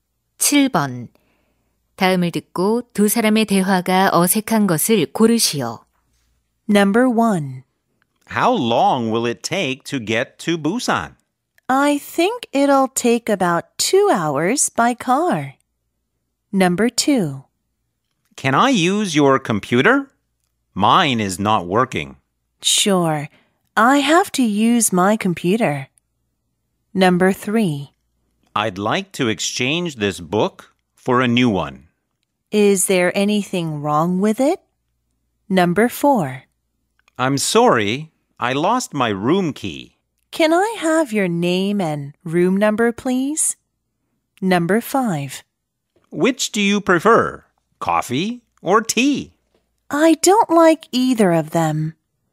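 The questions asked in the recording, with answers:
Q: 다음을 듣고 두 사람의 대화가 어색한 것을 고르시오.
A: 2: Can I use your computer? Mine is not working. / Sure. I have to use my computer.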